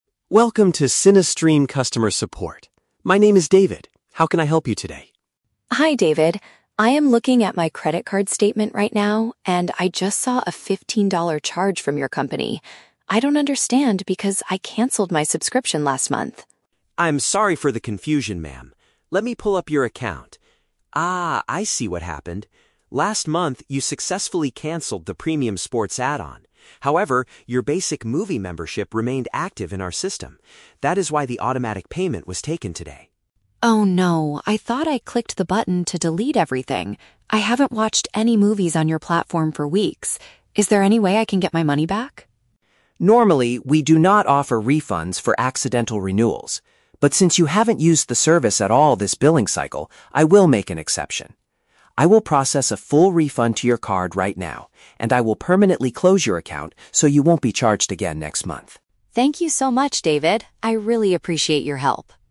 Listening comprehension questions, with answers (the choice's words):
Listen to a conversation between a customer and a support agent. For each question, choose the correct answer (A, B, or C).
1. Why is the customer contacting the support center today?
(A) To upgrade her current movie package to a better one.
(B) To ask about a regular automatic payment she did not expect.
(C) To report that someone stole her credit card to buy cinema tickets.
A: To ask about a regular automatic payment she did not expect.

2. What mistake did the customer make last month?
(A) She only removed the extra features instead of the whole service.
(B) She completely forgot to pay her monthly internet bill on time.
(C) She accidentally shared her password with her friends.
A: She only removed the extra features instead of the whole service.

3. How does the customer service agent solve the problem?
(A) He gives her a free month of movies to apologize for the system error.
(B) He tells her to contact her local bank immediately to block the credit card.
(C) He promises to return her money and completely close the account.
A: He promises to return her money and completely close the account.

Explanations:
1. Sarah says she saw a "fifteen-dollar charge... I canceled my subscription last month!" (asking about an automatic payment she did not expect). Option (A) is a trap; she is trying to cancel the service, not upgrade it. Option (C) is a trap; she mentions her "credit card" and "movies," but it was an automatic online payment, not a physical theft for cinema tickets.
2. David explains that she only canceled the "premium sports add-on" (extra features) but her "basic movie membership remained active" (instead of the whole service). Option (B) is a trap; the issue is about overpaying a subscription, not forgetting an internet bill. Option (C) is never mentioned in the audio.
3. David says, "I will process a full refund... and I will permanently close your account" (return her money and completely close the account). Option (A) is a trap; he mentions she hasn't watched movies, but he doesn't give her a free month. Option (B) is a trap; he handles the refund directly on his system, so she doesn't need to call her bank to block the card.

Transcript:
David: Welcome to CineStream Customer Support. My name is David. How can I help you today?
Sarah: Hi David. I am looking at my credit card statement right now, and I just saw a fifteen-dollar charge from your company. I don't understand because I canceled my subscription last month!
David: I'm sorry for the confusion, ma'am. Let me pull up your account... Ah, I see what happened. Last month, you successfully canceled the premium sports add-on. However, your basic movie membership remained active in our system. That is why the automatic payment was taken today.
Sarah: Oh no! I thought I clicked the button to delete everything. I haven't watched any movies on your platform for weeks. Is there any way I can get my money back?
David: Normally, we do not offer refunds for accidental renewals. But since you haven't used the service at all this billing cycle, I will make an exception. I will process a full refund to your card right now, and I will permanently close your account so you won't be charged again next month.